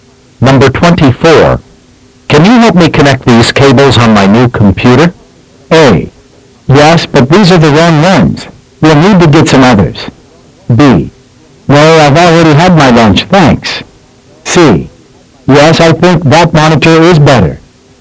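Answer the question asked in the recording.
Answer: A: Yes, but these are the wrong ones. We'll need to get some others.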